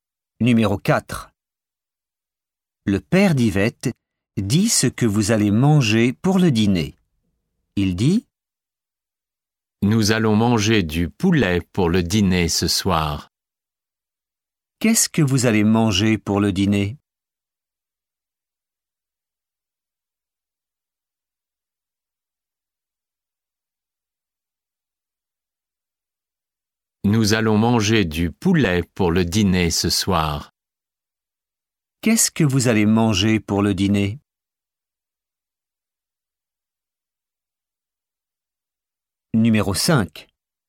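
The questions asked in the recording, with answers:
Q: Qu'est-ce que vous allez manger pour le dîner?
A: Du poulet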